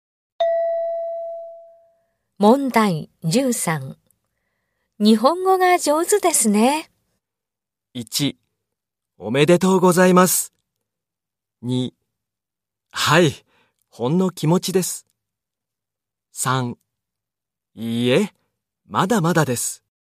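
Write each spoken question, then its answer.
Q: 日本語が上手ですね。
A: 3: いいえ、まだまだです。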